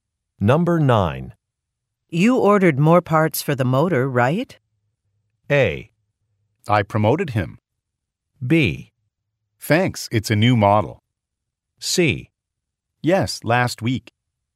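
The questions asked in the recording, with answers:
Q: You ordered more parts for the motor, right?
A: C: Yes, last week.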